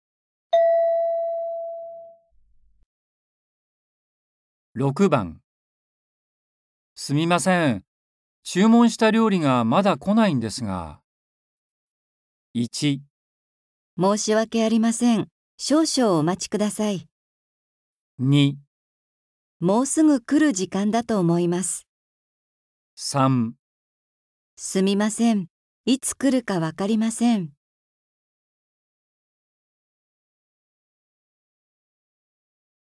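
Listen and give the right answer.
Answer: 1

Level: N4.36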